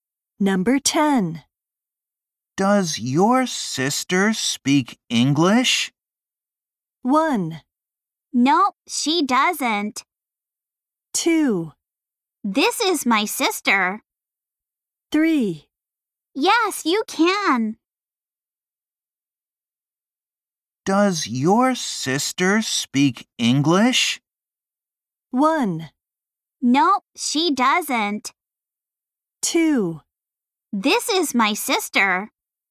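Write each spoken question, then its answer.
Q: Does your sister speak English?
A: 1: No, she doesn't.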